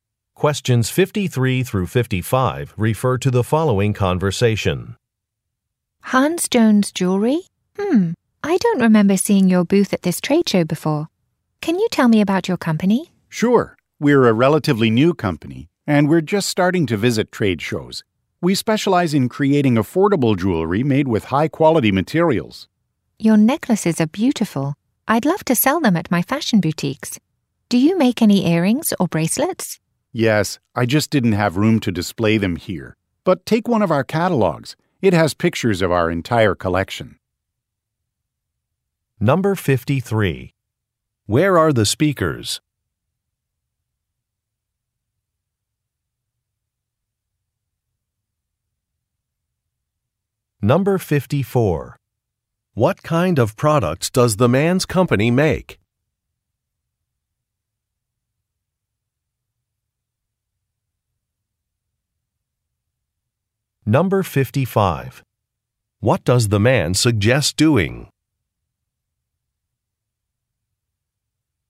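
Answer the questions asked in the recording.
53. At a trade show
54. Affordable jewelry
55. Taking a catalog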